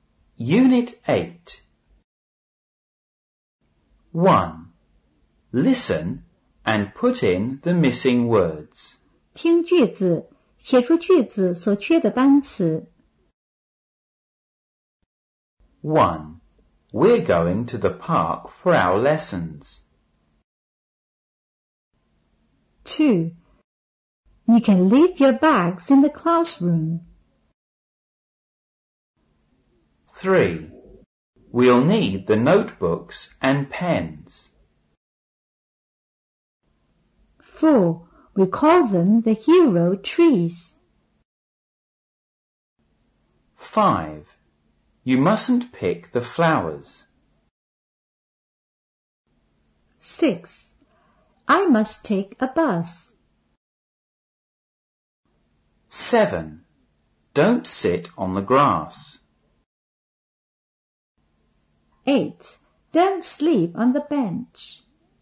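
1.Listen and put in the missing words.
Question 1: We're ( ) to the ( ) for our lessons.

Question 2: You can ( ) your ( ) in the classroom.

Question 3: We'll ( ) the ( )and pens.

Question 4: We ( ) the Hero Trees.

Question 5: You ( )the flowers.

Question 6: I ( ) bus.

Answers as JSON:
{"1": "going; park", "2": "leave; bags", "3": "need; notebooks", "4": "call them", "5": "mustn't pick", "6": "must take a"}

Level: 五年级上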